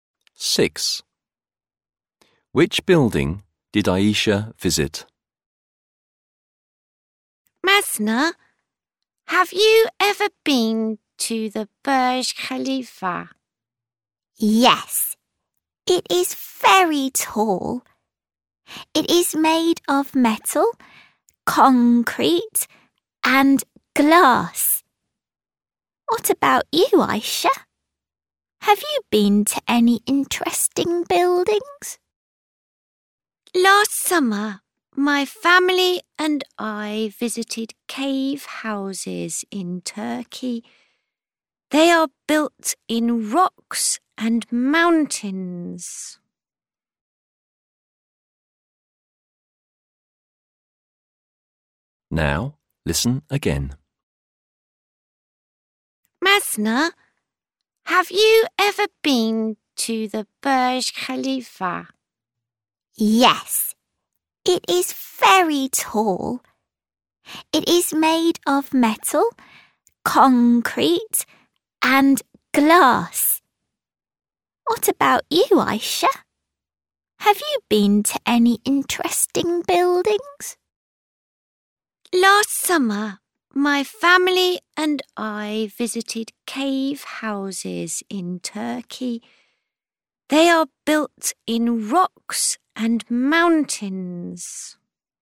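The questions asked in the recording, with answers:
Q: Which building did Aisha visit?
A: Cave houses in Turkey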